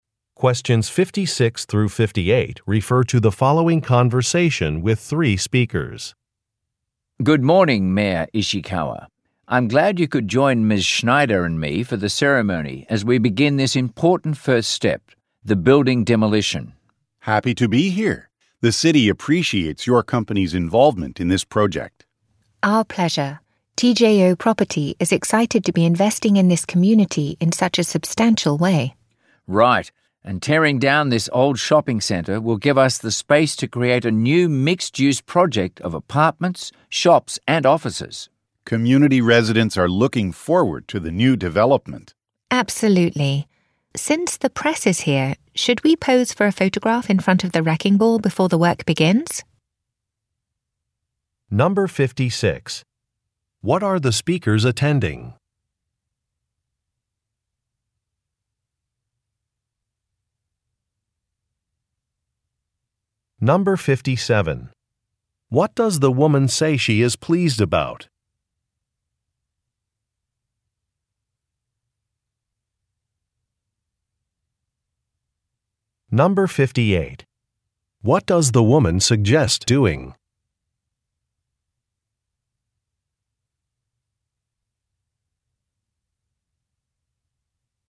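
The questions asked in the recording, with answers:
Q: What are the speakers attending?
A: A building demolition ceremony

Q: What does the woman suggest doing?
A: Posing for a photograph in front of the wrecking ball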